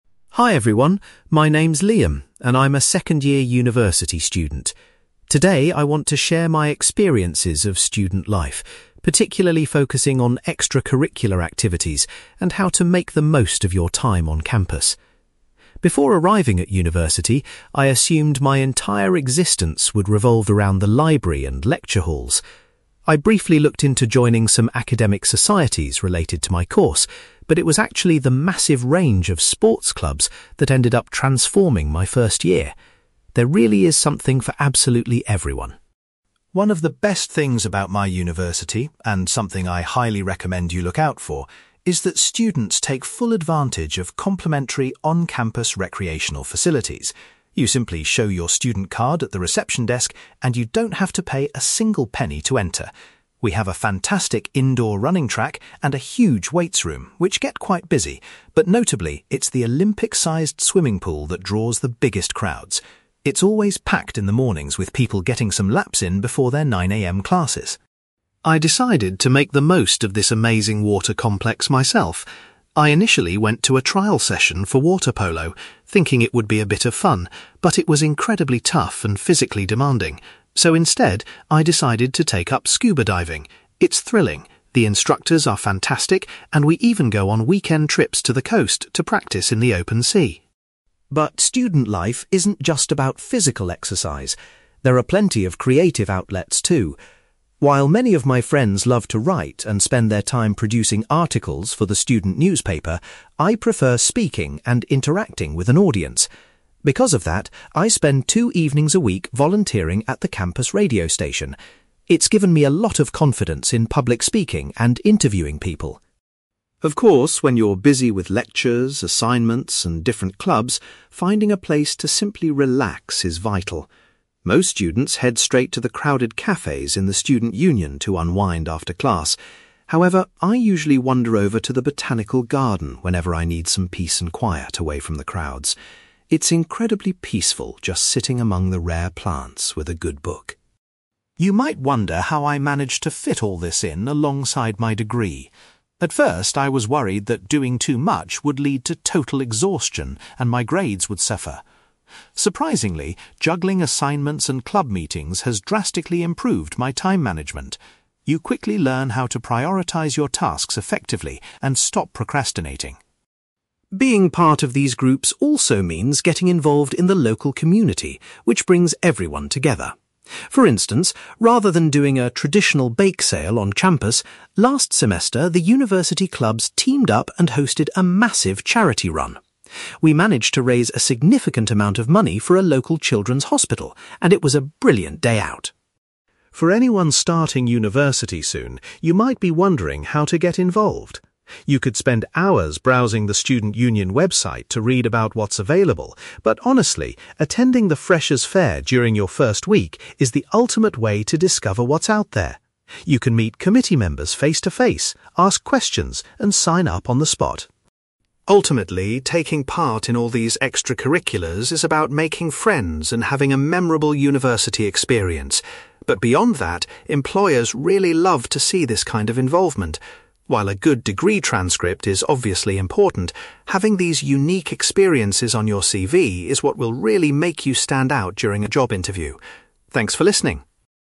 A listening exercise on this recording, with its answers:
You will hear a university student called Liam giving a presentation about student life and extracurricular activities. For questions 9-18, complete the sentences with a word or short phrase.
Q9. Liam was surprised by how much the university's (9)........................... changed his initial experience.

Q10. Liam mentions that students do not have to pay to use the on-campus (10)............................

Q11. According to Liam, the (11)........................... is the most popular venue on campus.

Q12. Rather than playing water polo, Liam chose to get involved in (12)........................... .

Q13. Liam spends some of his free time helping out at the university's (13)........................... .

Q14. When Liam wants to relax, he prefers to visit the (14)........................... .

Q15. Liam believes that participating in various activities has helped him develop his (15)........................... .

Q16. Students organized a (16)........................... to collect funds for a hospital.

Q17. Liam strongly recommends that new students go to the (17)........................... to find out about available activities.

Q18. Liam points out that extracurricular activities can be a valuable addition to a student's (18)........................... .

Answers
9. sports clubs
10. recreational facilities
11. swimming pool
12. scuba diving
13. radio station
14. botanical garden
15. time management
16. charity run
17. freshers' fair
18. CV

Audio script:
Liam: Hi everyone, my name is Liam, and I'm a second-year university student. Today, I want to share my experiences of student life, particularly focusing on extracurricular activities and how to make the most of your time on campus. Before arriving at university, I assumed my entire existence would revolve around the library and lecture halls. I briefly looked into joining some academic societies related to my course, but it was actually the massive range of sports clubs that ended up transforming my first year. There really is something for absolutely everyone.
One of the best things about my university, and something I highly recommend you look out for, is that students take full advantage of complimentary on-campus recreational facilities. You simply show your student card at the reception desk, and you don't have to pay a single penny to enter. We have a fantastic indoor running track and a huge weights room which get quite busy, but notably, it's the Olympic-sized swimming pool that draws the biggest crowds. It's always packed in the mornings with people getting some laps in before their nine a.m. classes!
I decided to make the most of this amazing water complex myself. I initially went to a trial session for water polo, thinking it would be a bit of fun, but it was incredibly tough and physically demanding. So instead, I decided to take up scuba diving. It's thrilling, the instructors are fantastic, and we even go on weekend trips to the coast to practice in the open sea.
But student life isn't just about physical exercise; there are plenty of creative outlets too. While many of my friends love to write and spend their time producing articles for the student newspaper, I prefer speaking and interacting with an audience. Because of that, I spend two evenings a week volunteering at the campus radio station. It's given me a lot of confidence in public speaking and interviewing people.
Of course, when you're busy with lectures, assignments, and different clubs, finding a place to simply relax is vital. Most students head straight to the crowded cafes in the student union to unwind after class. However, I usually wander over to the botanical garden whenever I need some peace and quiet away from the crowds. It's incredibly peaceful just sitting among the rare plants with a good book.
You might wonder how I manage to fit all this in alongside my degree. At first, I was worried that doing too much would lead to total exhaustion and my grades would suffer. Surprisingly, juggling assignments and club meetings has drastically improved my time management. You quickly learn how to prioritize your tasks effectively and stop procrastinating.
Being part of these groups also means getting involved in the local community, which brings everyone together. For instance, rather than doing a traditional bake sale on campus, last semester the university clubs teamed up and hosted a massive charity run. We managed to raise a significant amount of money for a local children's hospital, and it was a brilliant day out.
For anyone starting university soon, you might be wondering how to get involved. You could spend hours browsing the student union website to read about what's available, but honestly, attending the freshers' fair during your first week is the ultimate way to discover what's out there. You can meet committee members face-to-face, ask questions, and sign up on the spot.
Ultimately, taking part in all these extracurriculars is about making friends and having a memorable university experience. But beyond that, employers really love to see this kind of involvement. While a good degree transcript is obviously important, having these unique experiences on your CV is what will really make you stand out during a job interview. Thanks for listening!

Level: B2